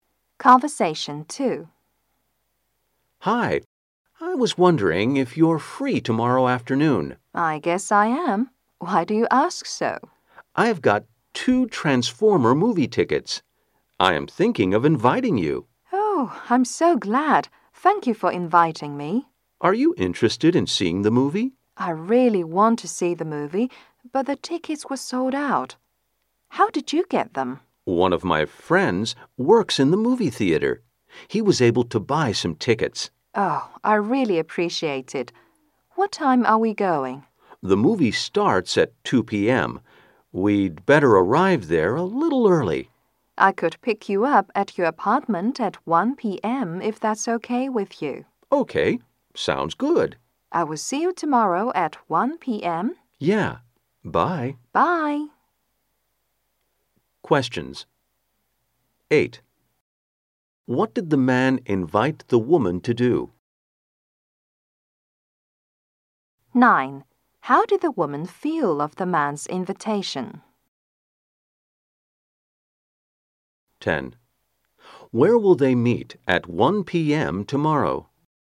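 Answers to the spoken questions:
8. To see a Transformer movie
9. Glad
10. At the woman's apartment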